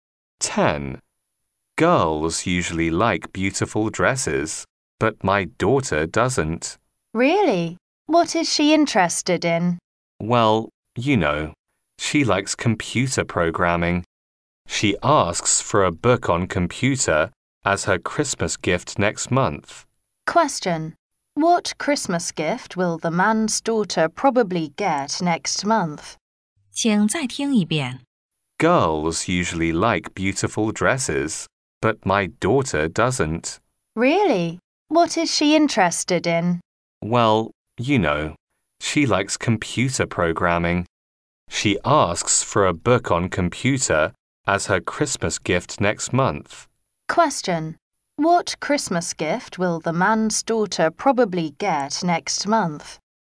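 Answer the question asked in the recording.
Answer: A book on computers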